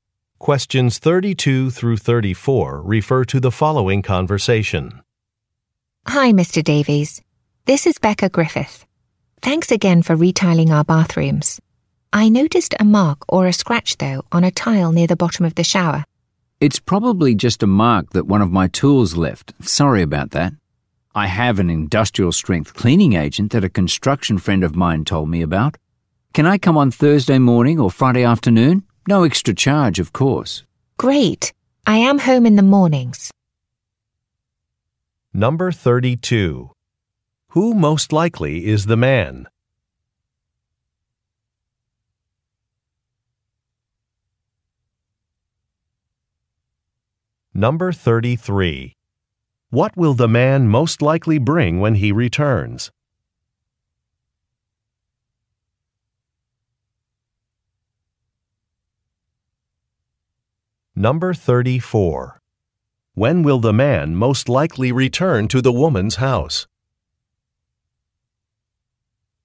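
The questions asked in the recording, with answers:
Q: Who most likely is the man?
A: A tile installer who retiled her bathrooms

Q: What will the man most likely bring when he returns?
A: An industrial-strength cleaning agent

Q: When will the man most likely return to the woman's house?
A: Thursday morning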